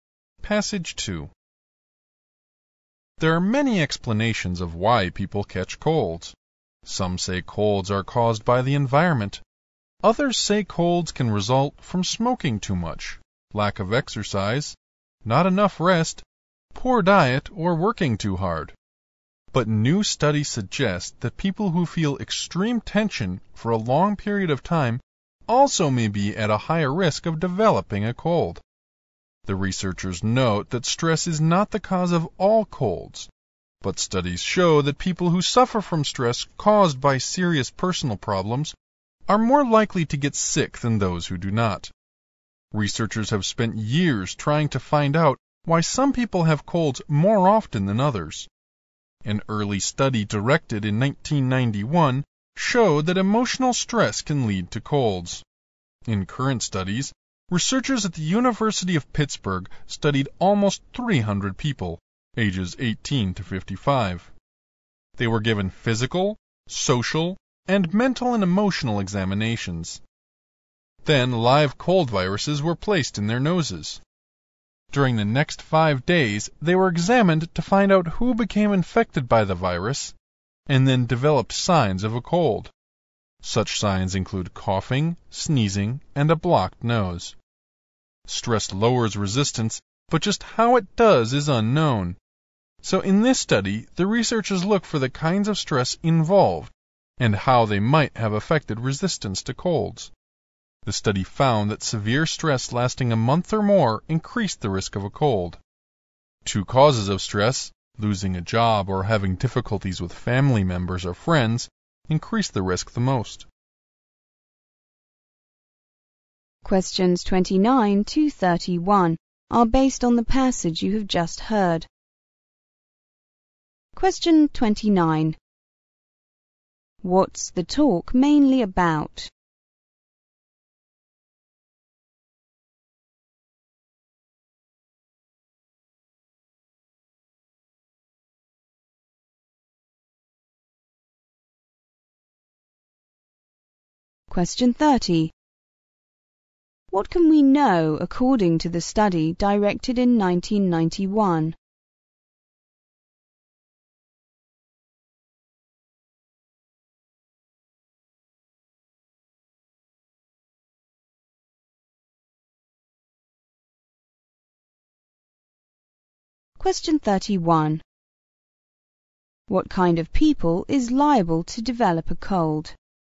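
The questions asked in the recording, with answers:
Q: What's the talk mainly about?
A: Stress and the risk of catching colds

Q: What can we know according to the study directed in 1991?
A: Emotional stress can lead to colds

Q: What kind of people is liable to develop a cold?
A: People under severe stress for a month or more, e.g. who lost a job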